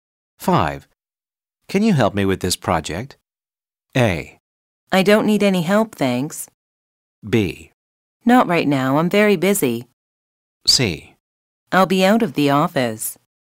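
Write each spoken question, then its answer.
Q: Can you help me with this project?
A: B: Not right now, I'm very busy.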